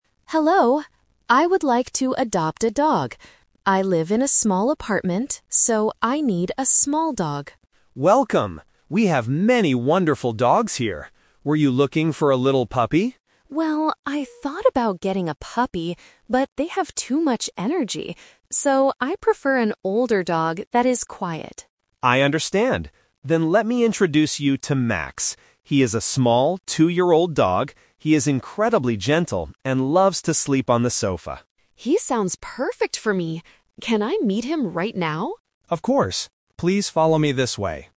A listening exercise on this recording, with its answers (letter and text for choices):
Listen to the conversation between a visitor and an animal shelter worker, and choose the correct answer (A, B, or C).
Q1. Why does the visitor need a small dog?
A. Because she lives in a small apartment.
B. Because she already has a big cat.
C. Because small dogs are cheaper to feed.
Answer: A. Because she lives in a small apartment.

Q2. Why does the visitor decide NOT to get a puppy?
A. Because the shelter doesn't have any puppies.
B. Because puppies have too much energy.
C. Because she wants a large guard dog instead.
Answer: B. Because puppies have too much energy.

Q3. What does the worker say about Max?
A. He is a very energetic puppy.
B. He loves to play outside all day.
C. He is a gentle, two-year-old dog.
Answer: C. He is a gentle, two-year-old dog.

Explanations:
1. The visitor states clearly at the beginning: "I live in a small apartment, so I need a small dog." Options (B) and (C) might be true in real life but are not mentioned in the audio.
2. The visitor says, "I thought about getting a puppy, but they have too much energy." Option (A) is the trap; the worker actually asks if she wants a puppy, meaning they likely have them, but the visitor changes her mind (The Twist). Option (C) is incorrect because she still wants a small dog, just an older one.
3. The worker describes Max as "a small, two-year-old dog" and says he is "incredibly gentle." Option (A) is the trap using the word "puppy," which was mentioned earlier but rejected. Option (B) is a distractor; the worker actually says Max "loves to sleep on the sofa."

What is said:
Visitor: Hello. I would like to adopt a dog. I live in a small apartment, so I need a small dog.
Worker: Welcome! We have many wonderful dogs here. Were you looking for a little puppy?
Visitor: Well, I thought about getting a puppy, but they have too much energy. So, I prefer an older dog that is quiet.
Worker: I understand. Then let me introduce you to Max. He is a small, two-year-old dog. He is incredibly gentle and loves to sleep on the sofa.
Visitor: He sounds perfect for me! Can I meet him right now?
Worker: Of course. Please follow me this way.